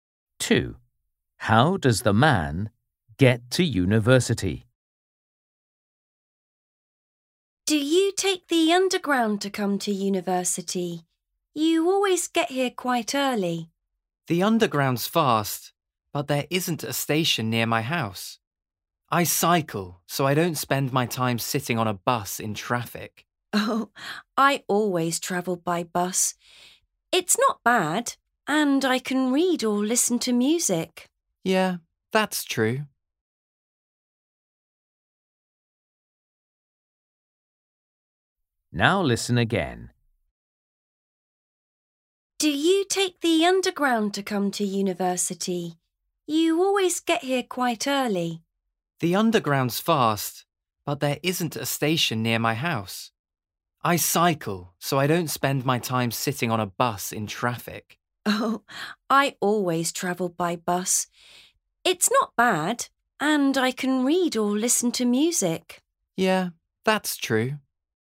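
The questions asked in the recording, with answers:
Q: How does the man get to university?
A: He cycles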